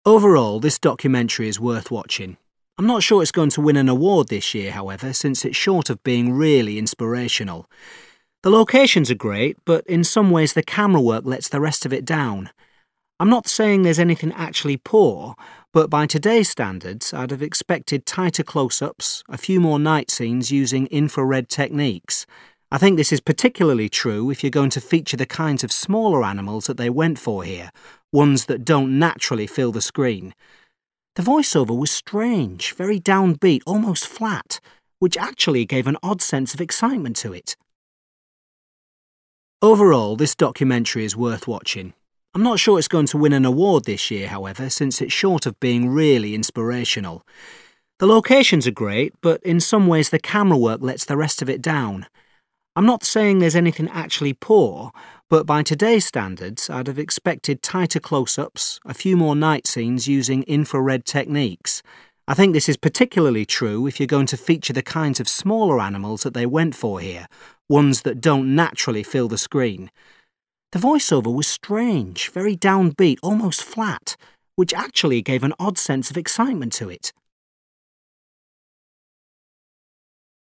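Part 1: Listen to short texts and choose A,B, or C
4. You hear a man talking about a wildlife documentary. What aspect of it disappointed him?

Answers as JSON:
{"4": "The camera work."}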